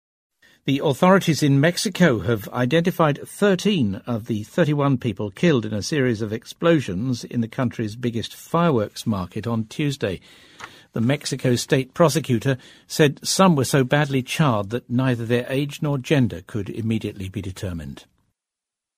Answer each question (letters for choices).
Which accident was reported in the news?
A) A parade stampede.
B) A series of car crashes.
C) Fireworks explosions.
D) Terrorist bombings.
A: C

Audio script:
The authorities in Mexico have identified 13 of the 31 people killed in a series of explosions in the country's biggest fireworks market on Tuesday. The Mexico state prosecutor said some were so badly charred that neither their age nor the gender could immediately be determined.

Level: C类